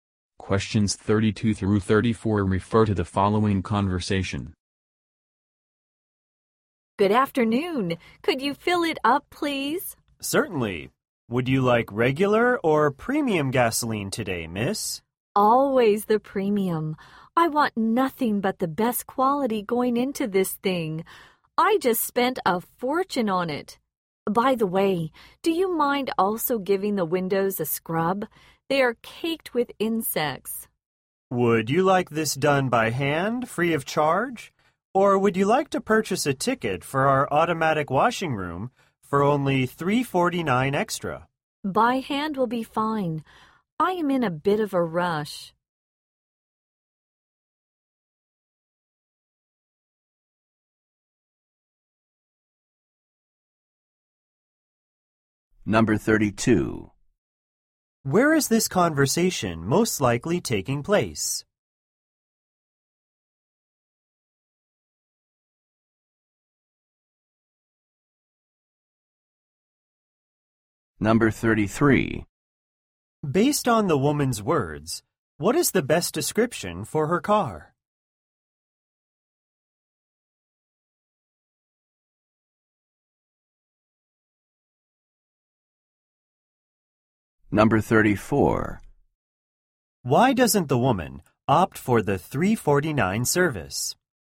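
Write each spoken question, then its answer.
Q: Where is this conversation most likely taking place?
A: At a gas station

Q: Based on the woman's words, what is the best description for her car?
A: It was very expensive

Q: Why doesn't the woman opt for the $3.49 service?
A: She is in a rush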